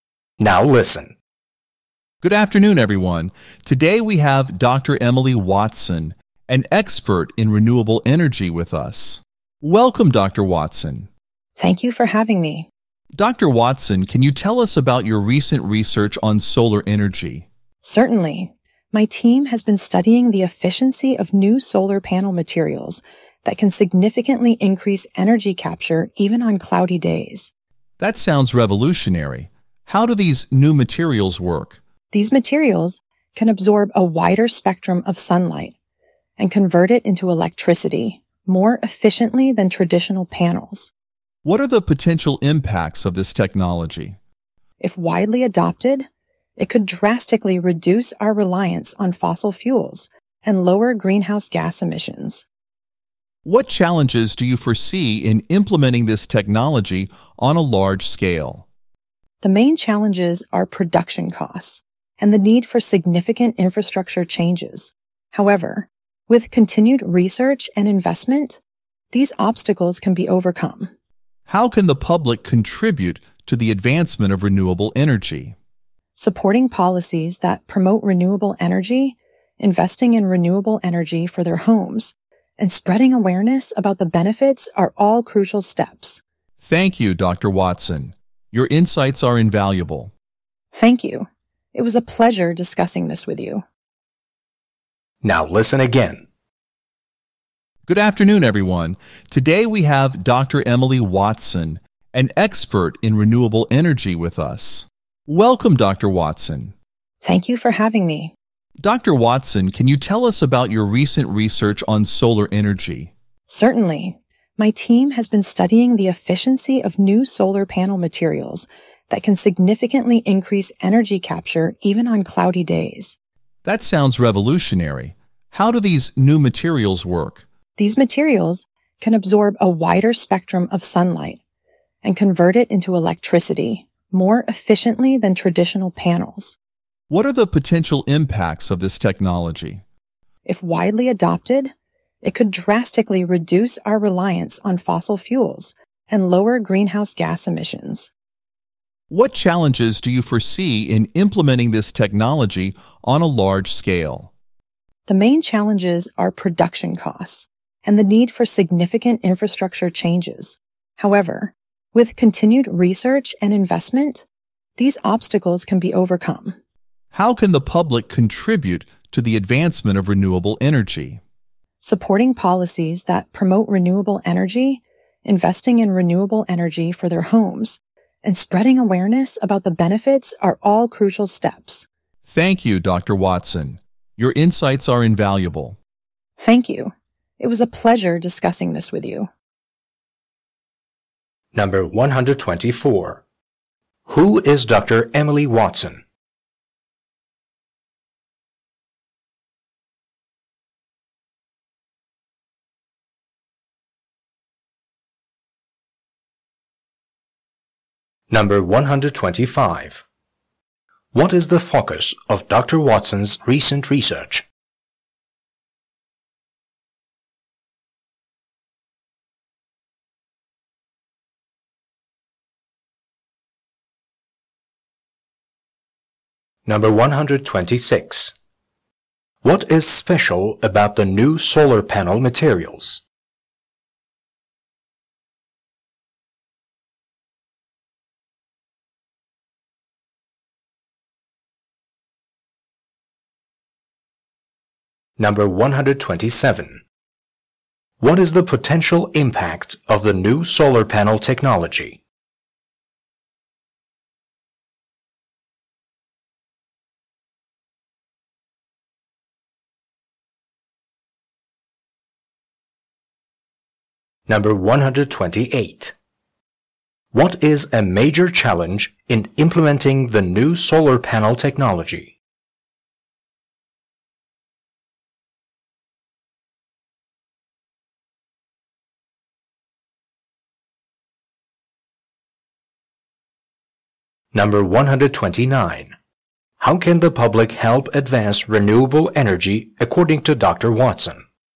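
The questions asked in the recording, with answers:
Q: Who is Dr. Emily Watson?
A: An expert in renewable energy

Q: What is the focus of Dr. Watson's recent research?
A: The efficiency of new solar panel materials

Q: What is special about the new solar panel materials?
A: They absorb a wider spectrum of sunlight and work even on cloudy days

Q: What is the potential impact of the new solar panel technology?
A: Reduced reliance on fossil fuels and lower greenhouse gas emissions

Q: What is a major challenge in implementing the new solar panel technology?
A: Production costs and infrastructure changes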